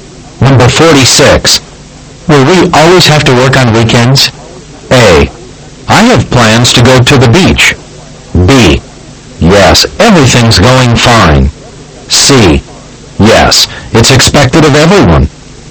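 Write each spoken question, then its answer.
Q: Will we always have to work on weekends?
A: C: Yes, it's expected of everyone.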